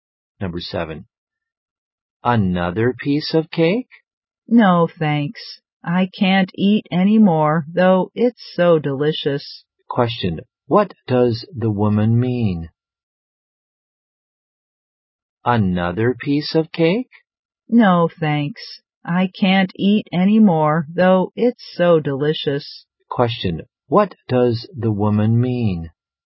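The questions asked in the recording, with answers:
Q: what does the woman mean?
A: She is full and can't eat any more cake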